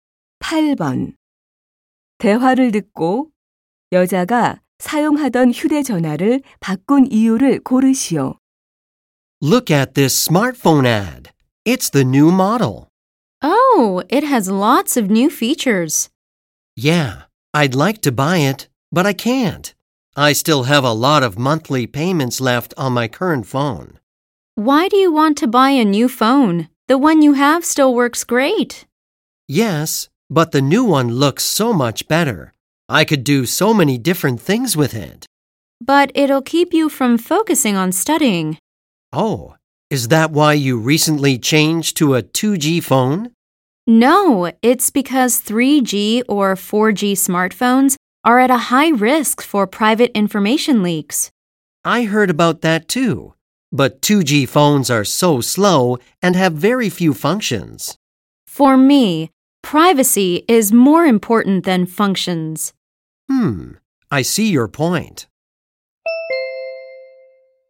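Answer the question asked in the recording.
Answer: 개인정보 유출 위험 때문에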